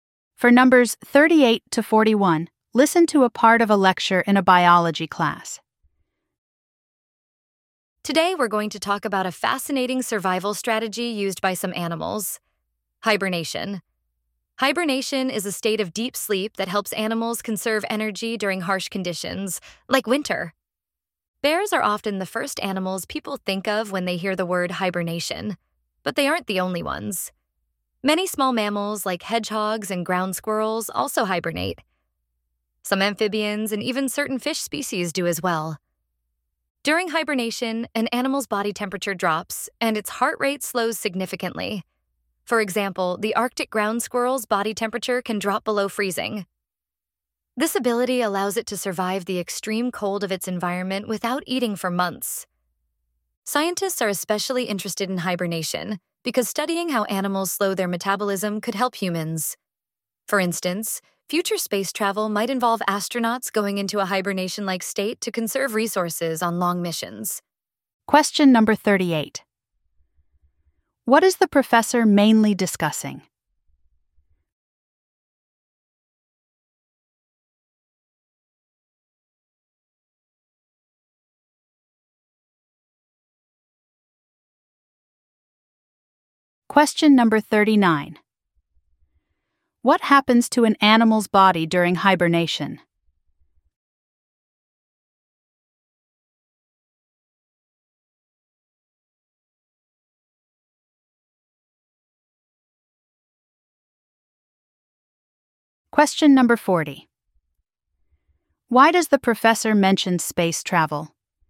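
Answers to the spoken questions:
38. Hibernation
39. Its body temperature drops and its heart rate slows
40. Astronauts might use a hibernation-like state to conserve resources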